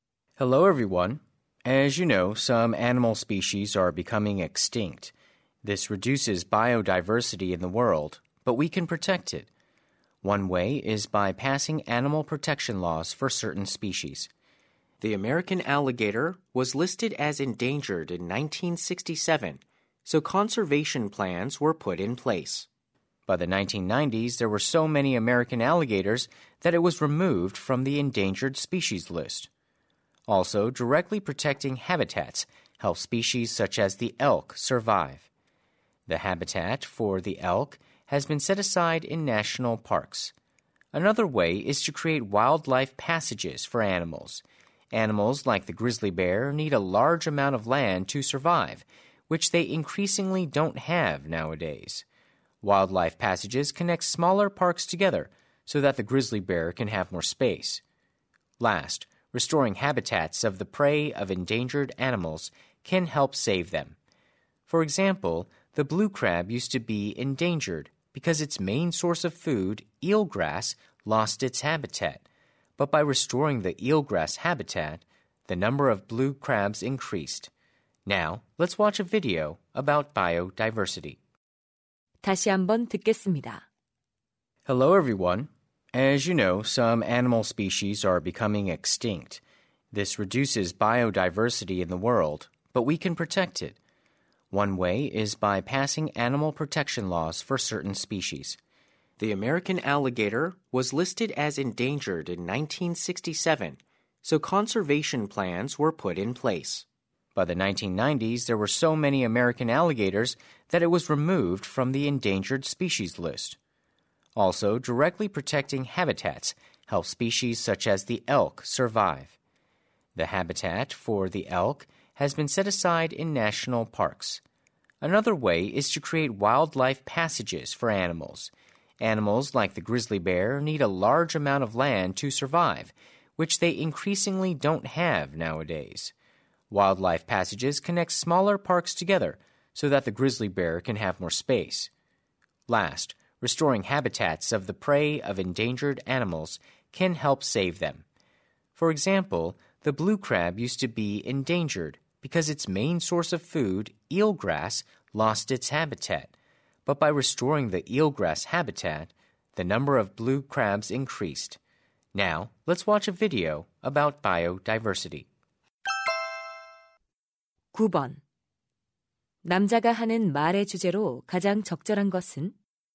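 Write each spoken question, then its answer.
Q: 남자가 하는 말의 주제로 가장 적절한 것은?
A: 생물 다양성(멸종 위기 동물)을 보호하는 방법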